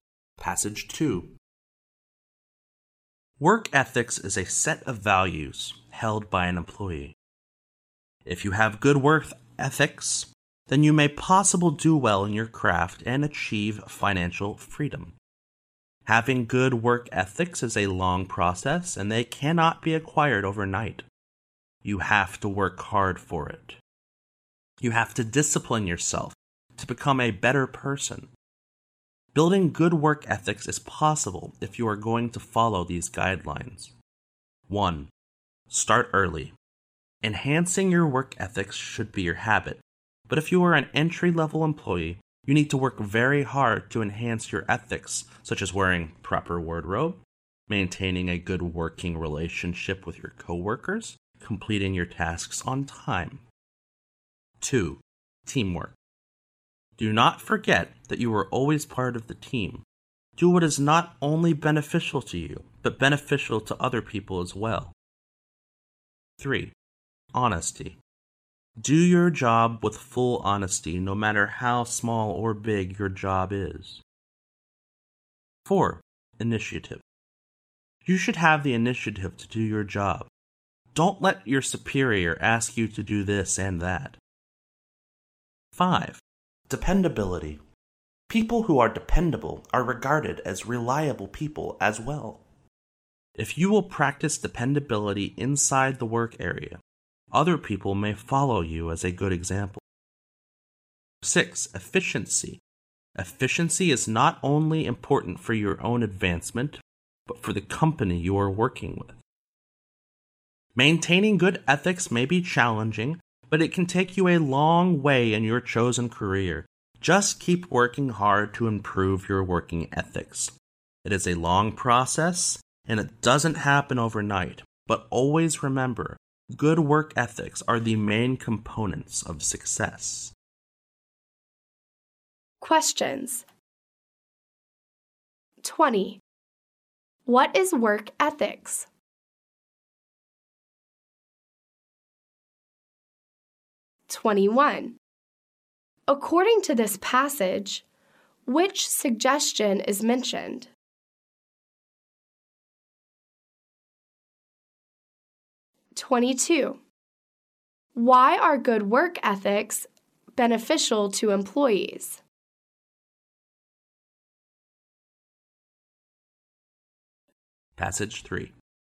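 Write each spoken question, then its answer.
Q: What is work ethics?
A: A set of values held by an employee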